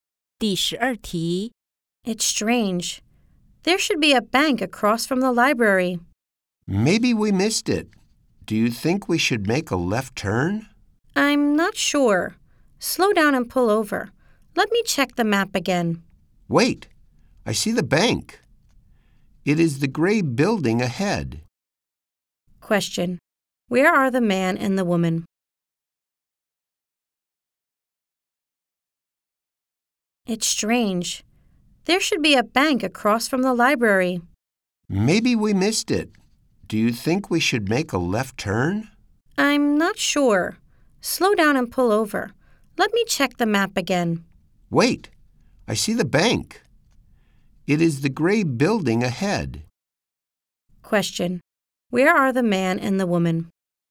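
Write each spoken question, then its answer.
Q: Where are the man and the woman?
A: In a car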